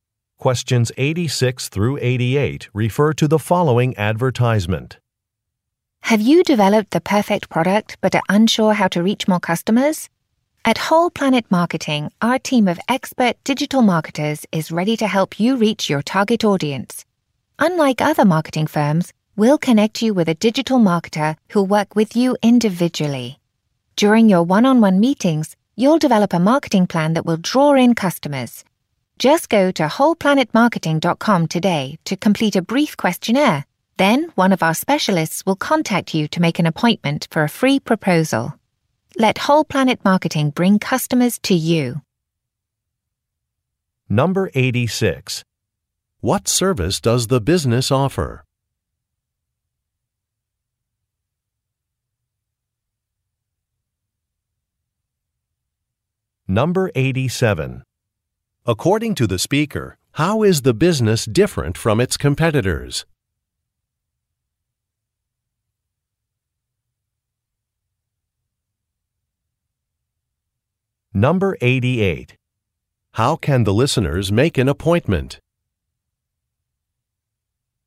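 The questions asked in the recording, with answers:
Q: What service does the business offer?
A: Digital marketing

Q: According to the speaker, how is the business different from its competitors?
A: Clients work individually with one digital marketer

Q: How can the listeners make an appointment?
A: Complete a questionnaire on the website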